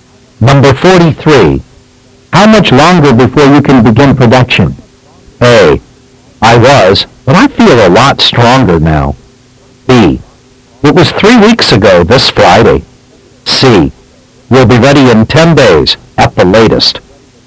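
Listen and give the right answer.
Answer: C: We'll be ready in 10 days at the latest.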